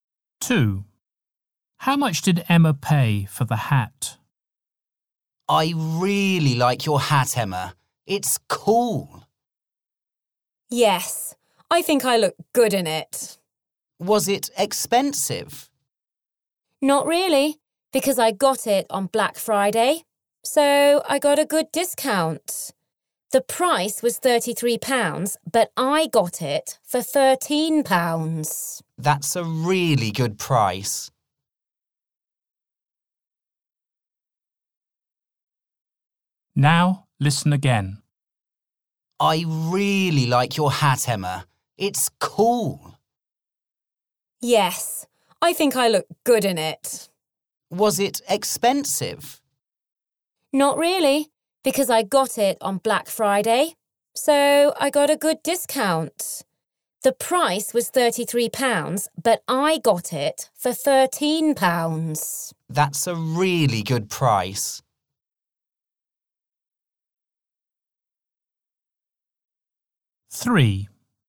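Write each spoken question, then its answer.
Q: How much did Emma pay for the hat?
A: £13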